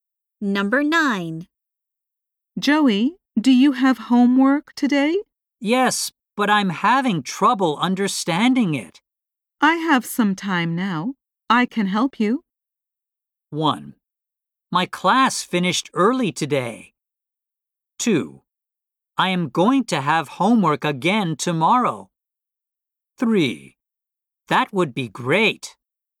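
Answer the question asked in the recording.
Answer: 3: That would be great.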